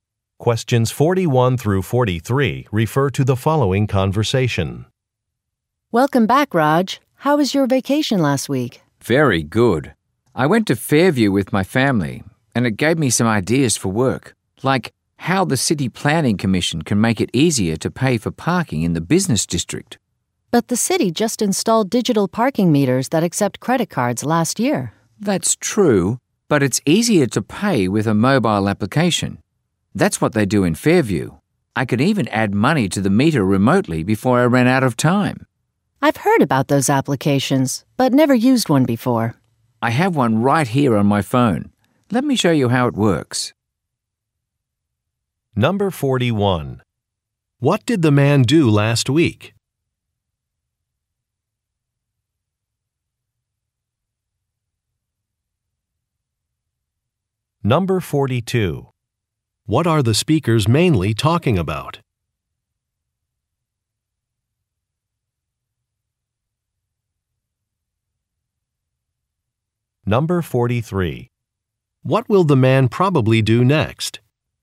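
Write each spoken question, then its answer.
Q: What did the man do last week?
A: Went on vacation with his family

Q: What are the speakers mainly talking about?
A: Paying for parking with a mobile application

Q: What will the man probably do next?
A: Show how the app works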